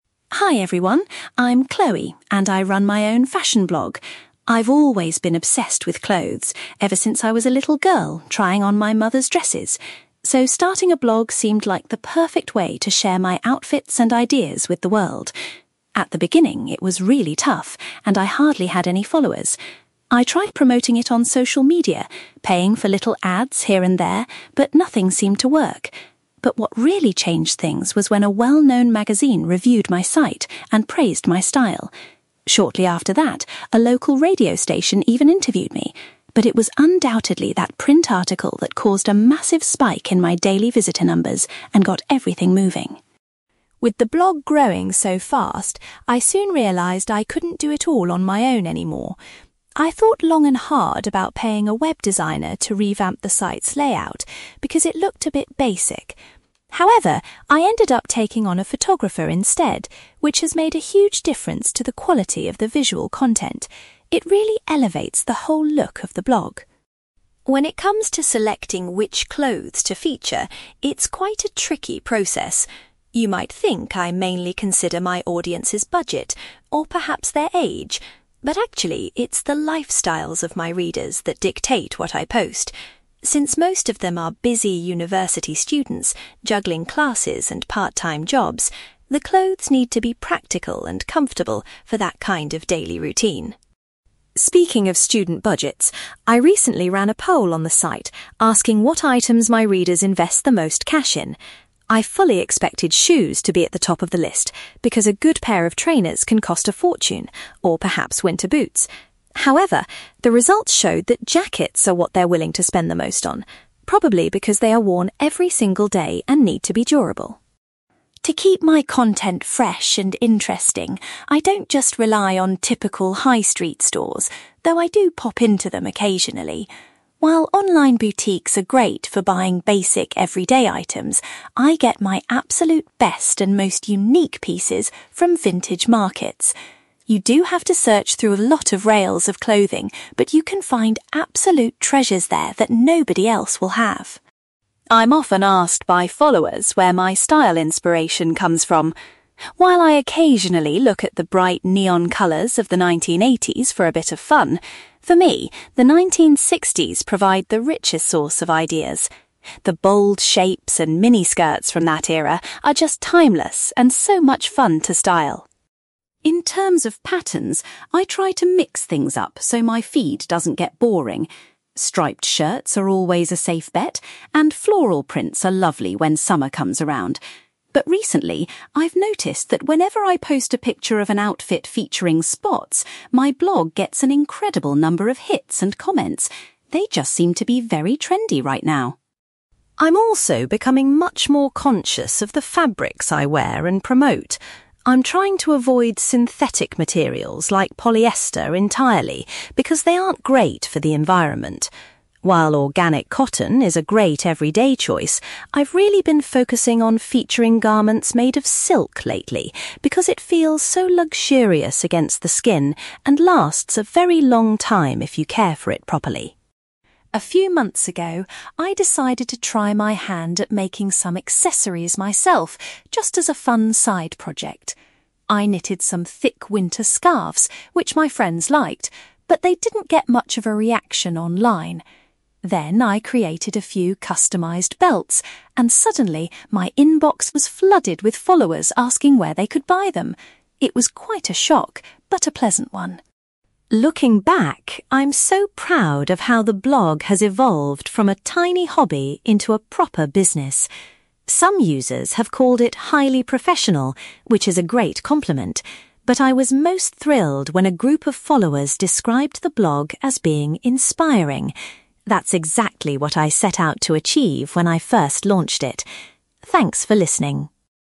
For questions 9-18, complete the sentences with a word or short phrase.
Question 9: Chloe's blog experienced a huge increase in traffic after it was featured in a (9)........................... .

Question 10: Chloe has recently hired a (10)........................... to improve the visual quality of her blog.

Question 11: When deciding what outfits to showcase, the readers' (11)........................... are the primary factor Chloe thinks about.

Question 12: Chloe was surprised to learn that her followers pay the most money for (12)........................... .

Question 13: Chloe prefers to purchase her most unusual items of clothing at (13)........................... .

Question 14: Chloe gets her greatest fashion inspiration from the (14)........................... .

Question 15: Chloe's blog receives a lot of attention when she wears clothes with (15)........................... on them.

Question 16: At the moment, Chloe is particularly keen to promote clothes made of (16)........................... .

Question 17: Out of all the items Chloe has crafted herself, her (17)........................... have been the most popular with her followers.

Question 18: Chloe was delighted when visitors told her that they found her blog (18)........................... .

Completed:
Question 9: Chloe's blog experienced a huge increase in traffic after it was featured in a magazine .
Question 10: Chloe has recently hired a photographer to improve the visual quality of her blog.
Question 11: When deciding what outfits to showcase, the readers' lifestyles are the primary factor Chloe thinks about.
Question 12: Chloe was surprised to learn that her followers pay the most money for jackets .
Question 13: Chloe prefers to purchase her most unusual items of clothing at vintage markets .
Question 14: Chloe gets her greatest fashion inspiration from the 1960s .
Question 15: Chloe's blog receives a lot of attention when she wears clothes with spots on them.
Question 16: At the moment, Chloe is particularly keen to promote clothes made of silk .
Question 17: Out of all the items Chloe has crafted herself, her belts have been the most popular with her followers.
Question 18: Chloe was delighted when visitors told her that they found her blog inspiring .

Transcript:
Chloe : Hi everyone, I'm Chloe, and I run my own fashion blog. I've always been obsessed with clothes, ever since I was a little girl trying on my mother's dresses. So starting a blog seemed like the perfect way to share my outfits and ideas with the world. At the beginning, it was really tough and I hardly had any followers. I tried promoting it on social media, paying for little ads here and there, but nothing seemed to work. But what really changed things was when a well-known magazine reviewed my site and praised my style. Shortly after that, a local radio station even interviewed me, but it was undoubtedly that print article that caused a massive spike in my daily visitor numbers and got everything moving.
With the blog growing so fast, I soon realised I couldn't do it all on my own anymore. I thought long and hard about paying a web designer to revamp the site's layout, because it looked a bit basic. However, I ended up taking on a photographer instead, which has made a huge difference to the quality of the visual content. It really elevates the whole look of the blog.
When it comes to selecting which clothes to feature, it's quite a tricky process. You might think I mainly consider my audience's budget, or perhaps their age, but actually, it's the lifestyles of my readers that dictate what I post. Since most of them are busy university students juggling classes and part-time jobs, the clothes need to be practical and comfortable for that kind of daily routine.
Speaking of student budgets, I recently ran a poll on the site asking what items my readers invest the most cash in. I fully expected shoes to be at the top of the list, because a good pair of trainers can cost a fortune, or perhaps winter boots. However, the results showed that jackets are what they're willing to spend the most on, probably because they are worn every single day and need to be durable.
To keep my content fresh and interesting, I don't just rely on typical high-street stores, though I do pop into them occasionally. While online boutiques are great for buying basic everyday items, I get my absolute best and most unique pieces from vintage markets. You do have to search through a lot of rails of clothing, but you can find absolute treasures there that nobody else will have.
I'm often asked by followers where my style inspiration comes from. While I occasionally look at the bright neon colours of the 1980s for a bit of fun, for me, the 1960s provide the richest source of ideas. The bold shapes and mini skirts from that era are just timeless and so much fun to style.
In terms of patterns, I try to mix things up so my feed doesn't get boring. Striped shirts are always a safe bet, and floral prints are lovely when summer comes around. But recently, I've noticed that whenever I post a picture of an outfit featuring spots, my blog gets an incredible number of hits and comments. They just seem to be very trendy right now!
I'm also becoming much more conscious of the fabrics I wear and promote. I'm trying to avoid synthetic materials like polyester entirely because they aren't great for the environment. While organic cotton is a great everyday choice, I've really been focusing on featuring garments made of silk lately, because it feels so luxurious against the skin and lasts a very long time if you care for it properly.
A few months ago, I decided to try my hand at making some accessories myself, just as a fun side project. I knitted some thick winter scarves, which my friends liked, but they didn't get much of a reaction online. Then I created a few customized belts, and suddenly my inbox was flooded with followers asking where they could buy them! It was quite a shock, but a pleasant one.
Looking back, I'm so proud of how the blog has evolved from a tiny hobby into a proper business. Some users have called it highly professional, which is a great compliment, but I was most thrilled when a group of followers described the blog as being inspiring. That's exactly what I set out to achieve when I first launched it. Thanks for listening!

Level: B2